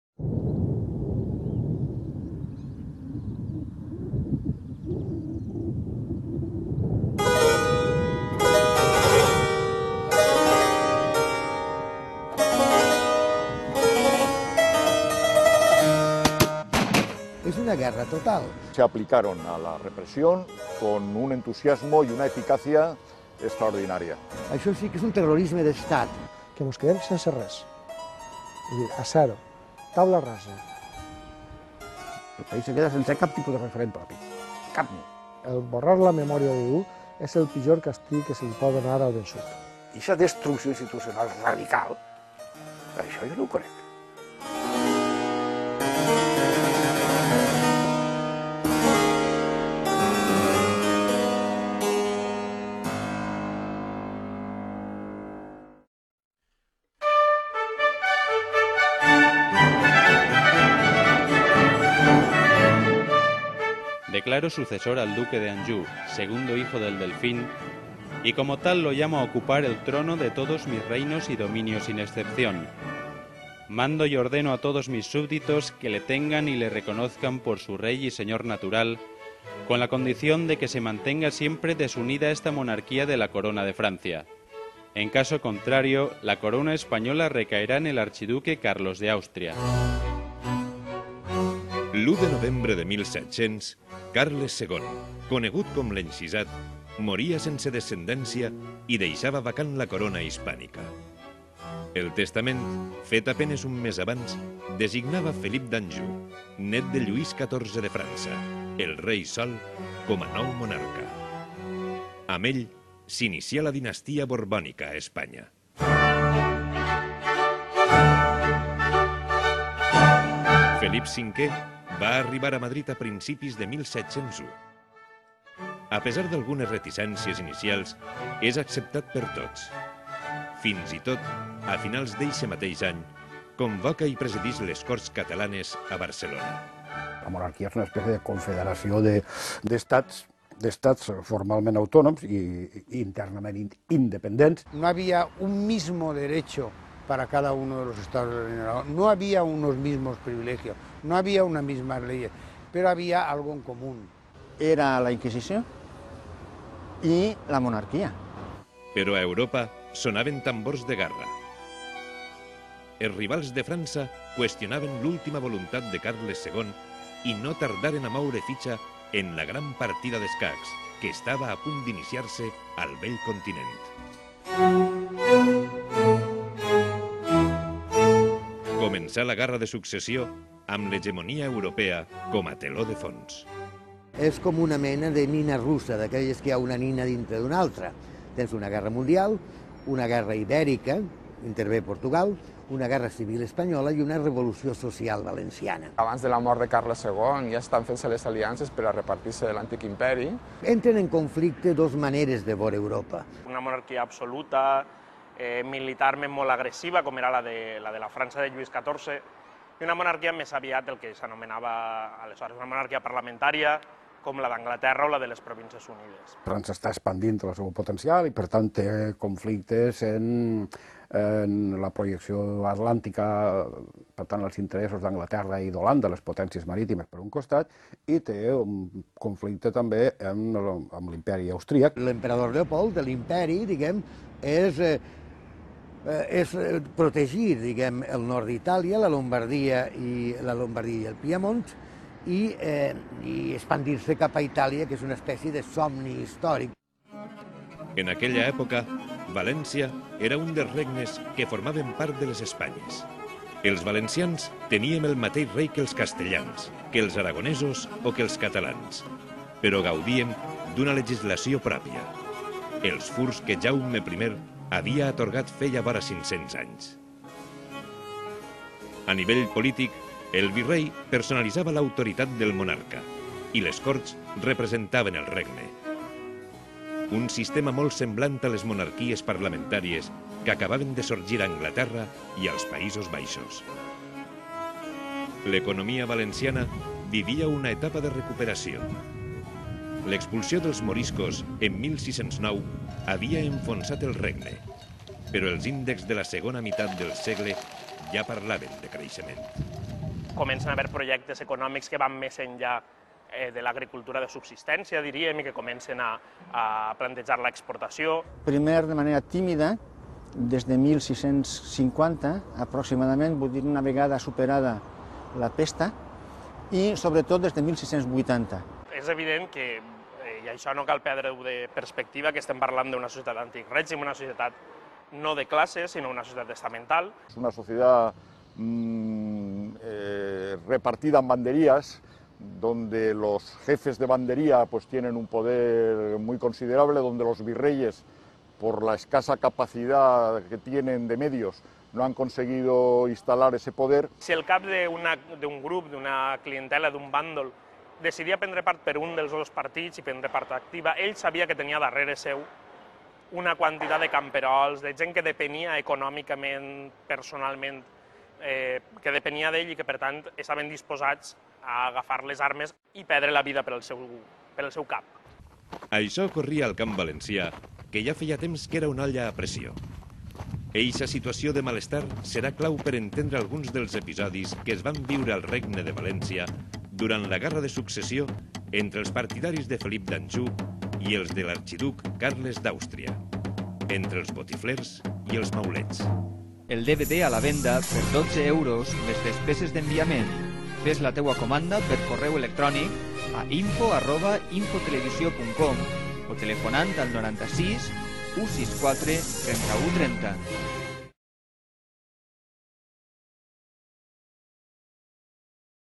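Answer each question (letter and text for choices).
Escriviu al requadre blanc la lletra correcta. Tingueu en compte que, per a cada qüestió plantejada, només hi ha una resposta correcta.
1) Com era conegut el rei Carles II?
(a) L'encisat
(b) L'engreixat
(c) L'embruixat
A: (a) L'encisat

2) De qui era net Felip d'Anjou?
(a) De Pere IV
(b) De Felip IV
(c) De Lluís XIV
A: (c) De Lluís XIV

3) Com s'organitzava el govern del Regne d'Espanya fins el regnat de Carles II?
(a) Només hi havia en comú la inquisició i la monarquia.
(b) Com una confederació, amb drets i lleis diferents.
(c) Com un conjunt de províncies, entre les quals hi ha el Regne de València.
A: (b) Com una confederació, amb drets i lleis diferents.

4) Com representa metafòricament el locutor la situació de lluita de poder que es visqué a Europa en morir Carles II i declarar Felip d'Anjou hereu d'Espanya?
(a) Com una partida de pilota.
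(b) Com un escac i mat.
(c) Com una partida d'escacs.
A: (c) Com una partida d'escacs.

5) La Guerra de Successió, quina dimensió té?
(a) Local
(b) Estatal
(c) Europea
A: (c) Europea

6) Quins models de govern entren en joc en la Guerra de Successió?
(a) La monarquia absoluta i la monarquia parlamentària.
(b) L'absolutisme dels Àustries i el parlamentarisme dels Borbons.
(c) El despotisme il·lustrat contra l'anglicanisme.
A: (a) La monarquia absoluta i la monarquia parlamentària.

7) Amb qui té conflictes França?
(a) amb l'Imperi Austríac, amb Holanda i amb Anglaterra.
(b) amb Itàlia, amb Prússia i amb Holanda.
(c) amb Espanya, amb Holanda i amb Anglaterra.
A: (a) amb l'Imperi Austríac, amb Holanda i amb Anglaterra.

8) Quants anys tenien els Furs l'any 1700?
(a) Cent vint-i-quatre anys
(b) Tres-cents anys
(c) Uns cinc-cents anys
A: (c) Uns cinc-cents anys

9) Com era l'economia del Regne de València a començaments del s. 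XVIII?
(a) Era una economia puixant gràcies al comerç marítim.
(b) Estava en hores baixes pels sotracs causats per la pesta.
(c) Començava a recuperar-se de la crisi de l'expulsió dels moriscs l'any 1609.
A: (c) Començava a recuperar-se de la crisi de l'expulsió dels moriscs l'any 1609.

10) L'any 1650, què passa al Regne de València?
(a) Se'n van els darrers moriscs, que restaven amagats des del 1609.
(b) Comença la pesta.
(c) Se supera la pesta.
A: (c) Se supera la pesta.

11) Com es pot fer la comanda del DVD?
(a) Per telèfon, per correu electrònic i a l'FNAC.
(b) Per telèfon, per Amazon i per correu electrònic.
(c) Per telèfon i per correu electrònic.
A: (c) Per telèfon i per correu electrònic.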